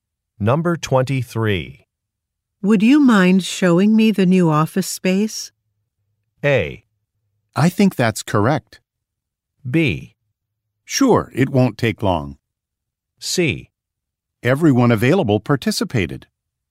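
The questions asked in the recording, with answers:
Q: Would you mind showing me the new office space?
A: B: Sure, it won't take long.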